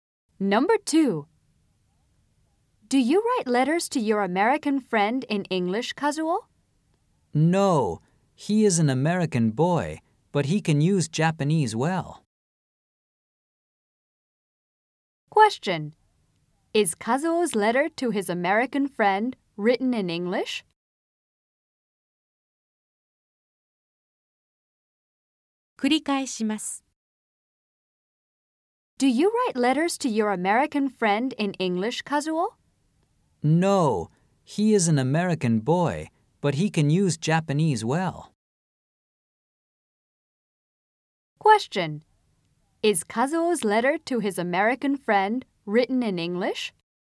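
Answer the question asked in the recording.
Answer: No, it isn't.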